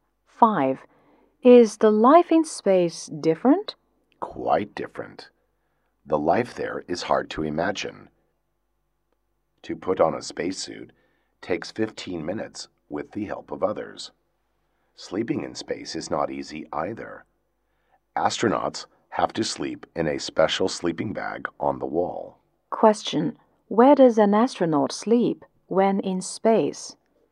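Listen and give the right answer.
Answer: In a special sleeping bag on the wall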